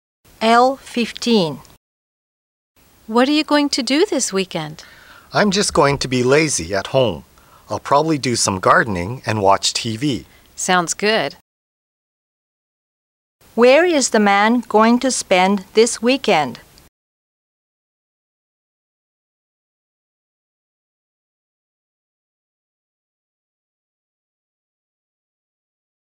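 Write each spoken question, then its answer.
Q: Where is the man going to spend this weekend?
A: At home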